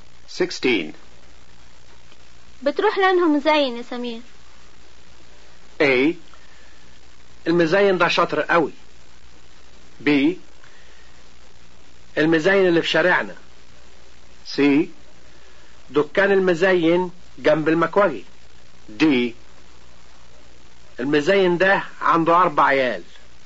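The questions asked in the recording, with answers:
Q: بتروح لانه مزين يا سمير.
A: B: المزين اللي في شارعنا.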